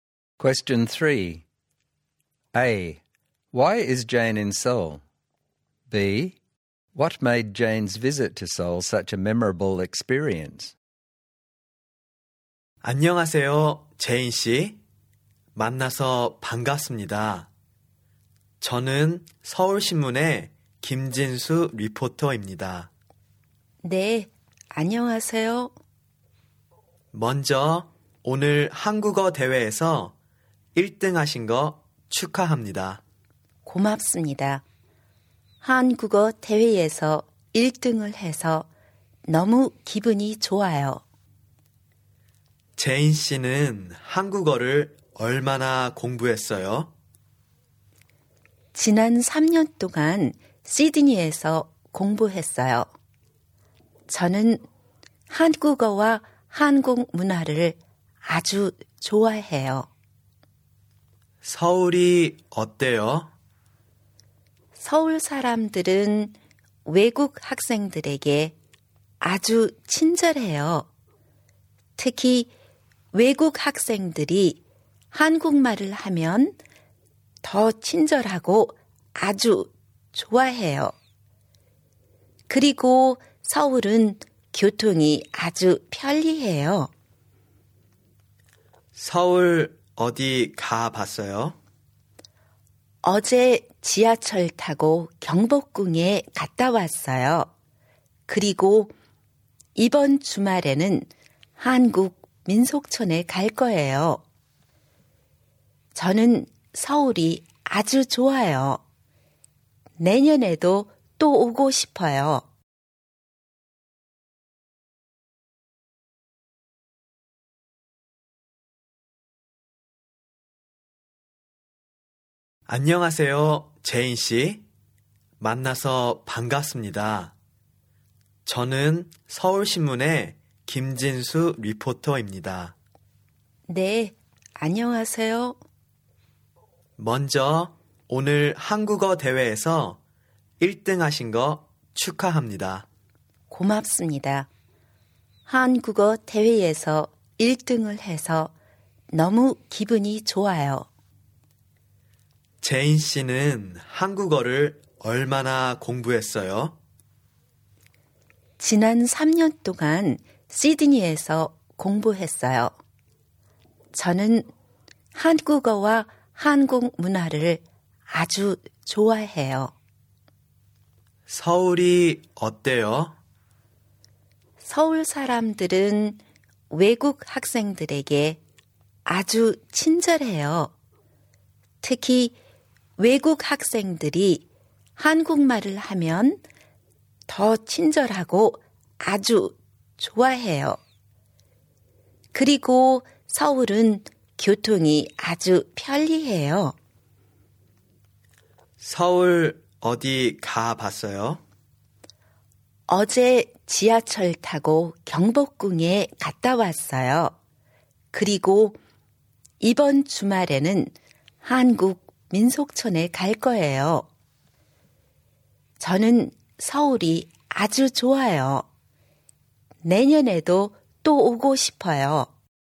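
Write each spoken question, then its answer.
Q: Why is Jane in Seoul?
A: She took part in a Korean language contest, where she won first place

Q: What made Jane's visit to Seoul such a memorable experience?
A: People in Seoul are very kind to foreign students, especially when they speak Korean, and the transport is very convenient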